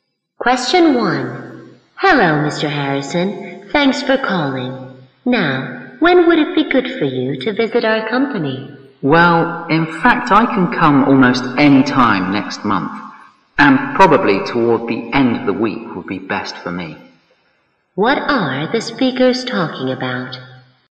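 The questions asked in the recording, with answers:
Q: What are the speakers talking about?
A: When Mr. Harrison can visit the company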